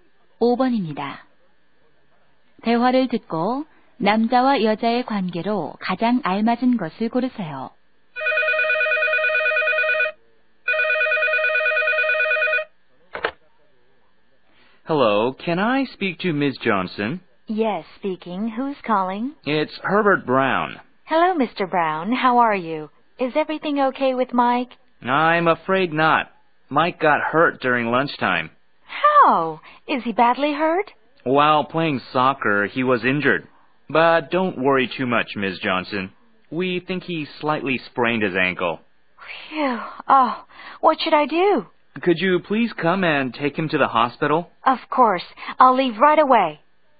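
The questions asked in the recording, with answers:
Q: 대화를 듣고 남자와 여자의 관계로 가장 알맞은 것을 고르세요.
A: 교사와 학부모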